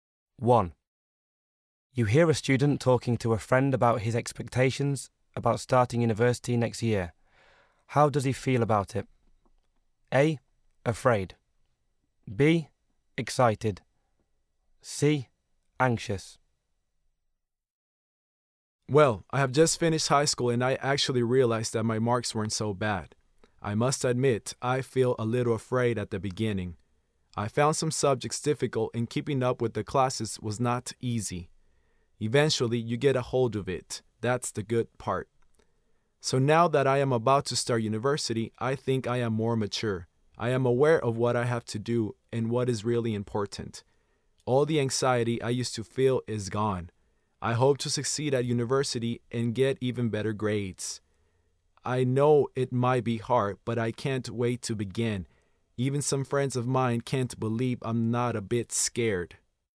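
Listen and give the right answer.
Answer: B: Excited.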